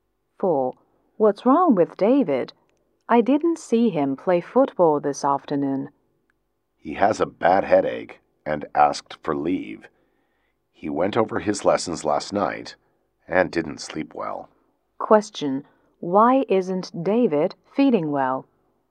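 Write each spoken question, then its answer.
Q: Why isn't David feeling well?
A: He went over his lessons last night and didn't sleep well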